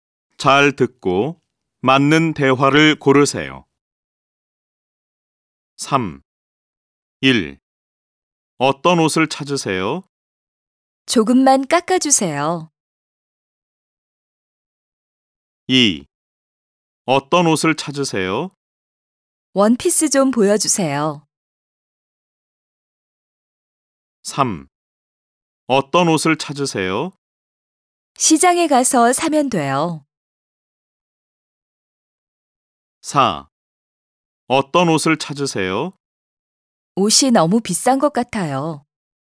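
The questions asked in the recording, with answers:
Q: 어떤 옷을 찾으세요?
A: 2: 원피스 좀 보여주세요.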